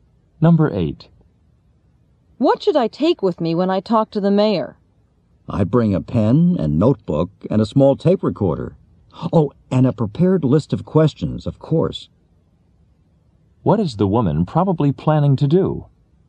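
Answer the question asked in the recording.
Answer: Interview the mayor.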